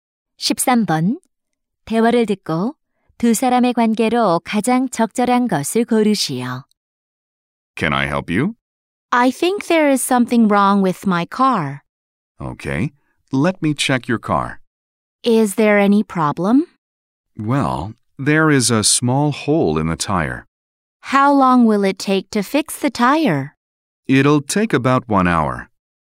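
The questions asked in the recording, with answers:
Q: 대화를 듣고 두 사람의 관계로 가장 적절한 것을 고르시오.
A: 정비사 - 손님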